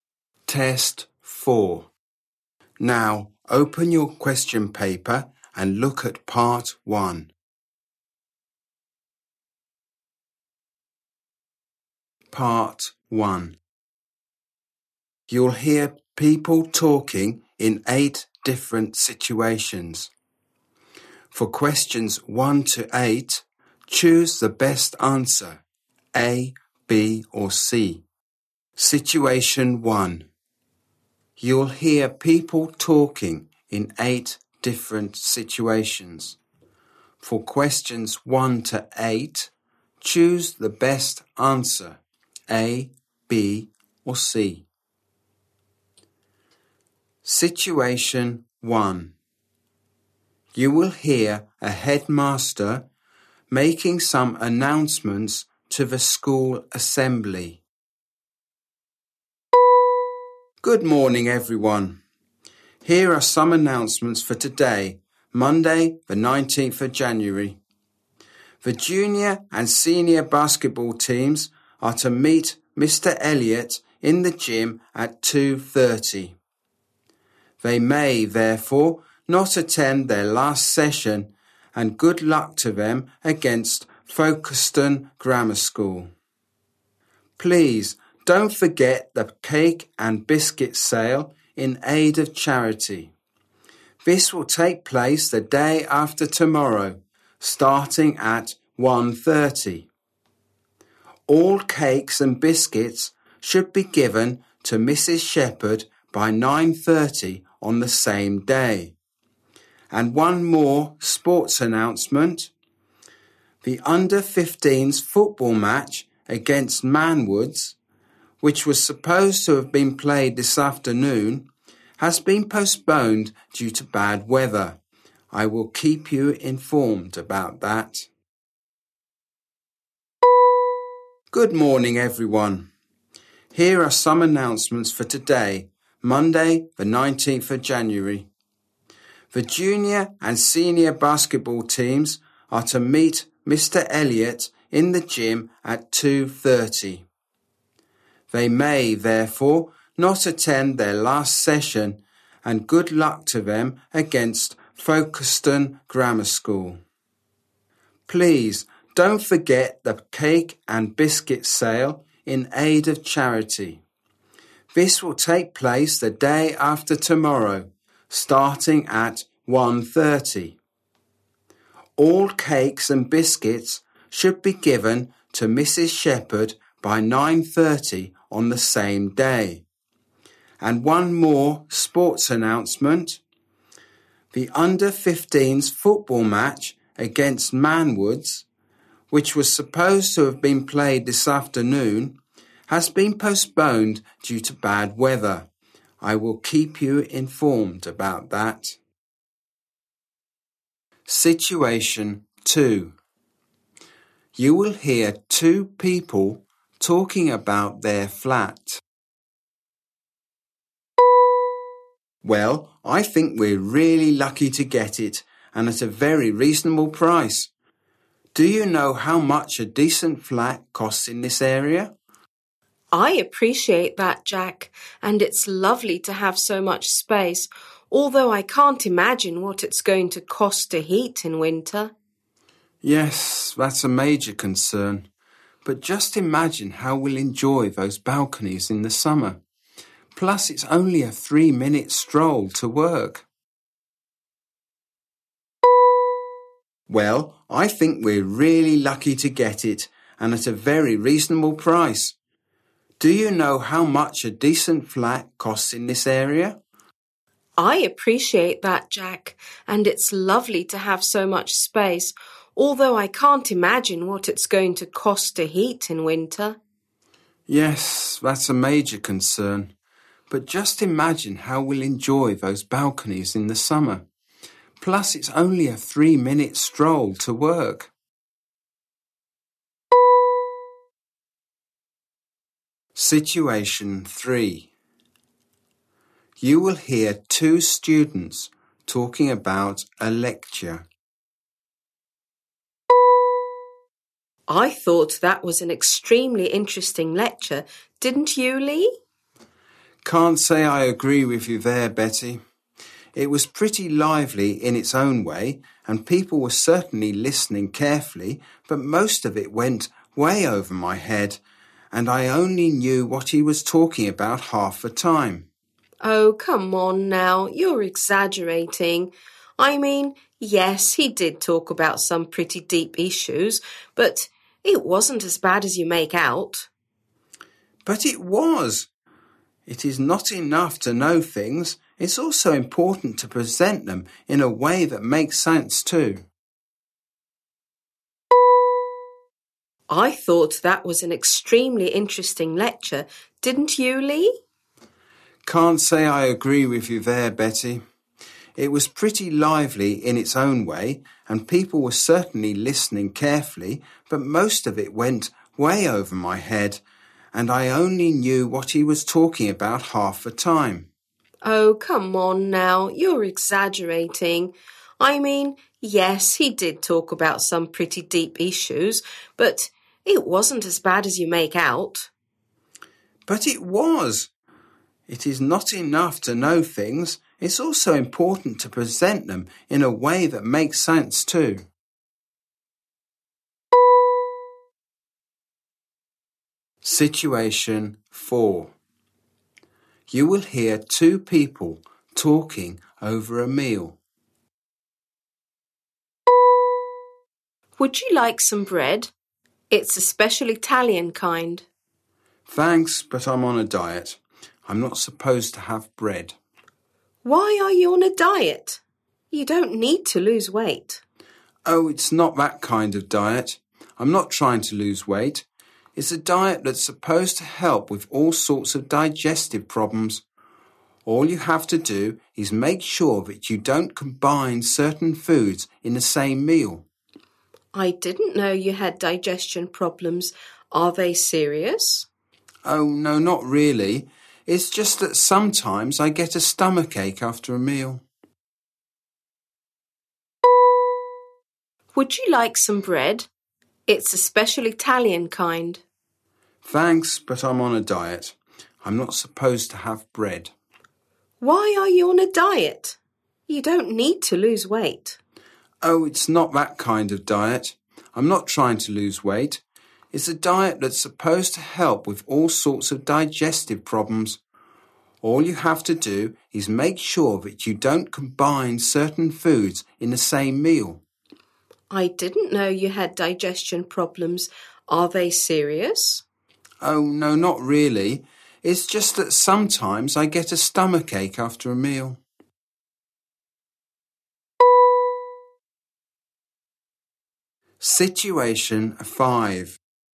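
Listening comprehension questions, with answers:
You will hear people talking in eight different situations. For questions 1-8, choose the best answer (A, B or C).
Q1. When is the cake and biscuit sale?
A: The day after tomorrow (Wednesday), starting at 1:30

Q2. What is their main concern about their flat?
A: The cost of heating it in winter

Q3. What did the man think of it?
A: It was hard to understand; not presented in a way that made sense

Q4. Why doesn't the man want bread?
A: He is on a diet for digestive problems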